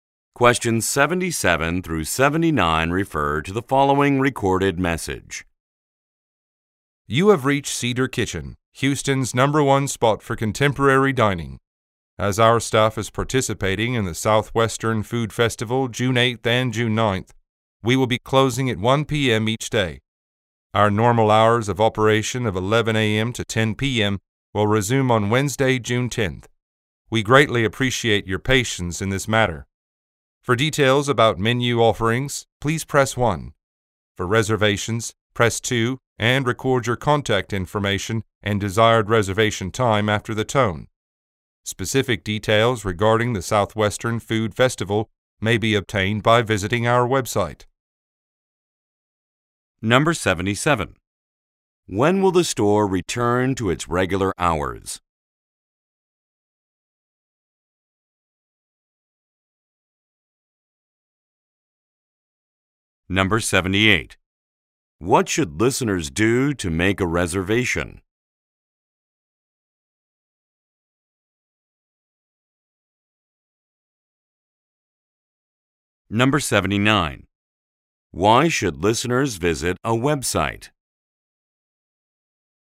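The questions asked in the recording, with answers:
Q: When will the store return to its regular hours?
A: June 10th

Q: What should listeners do to make a reservation?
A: Press 2 and leave their details

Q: Why should listeners visit a website?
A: For details about the food festival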